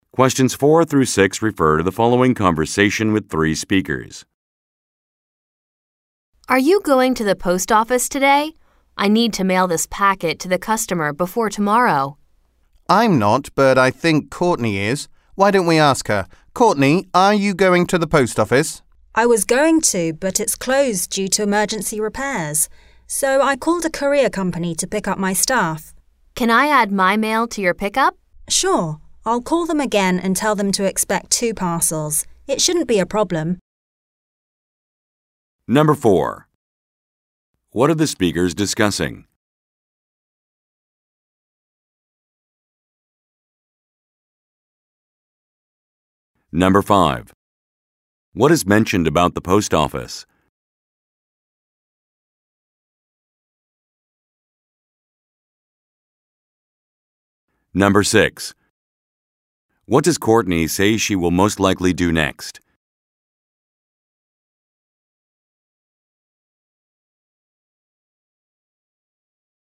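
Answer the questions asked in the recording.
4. Sending a packet to a customer by mail
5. It is closed due to emergency repairs
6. Call the courier company again to tell them to expect two parcels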